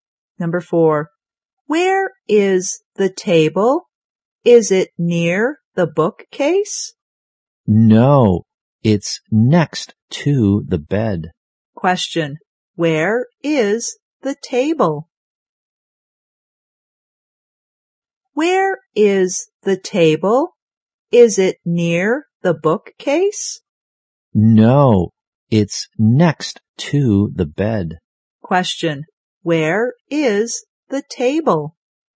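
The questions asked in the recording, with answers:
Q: Question, where is the table?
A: Next to the bed.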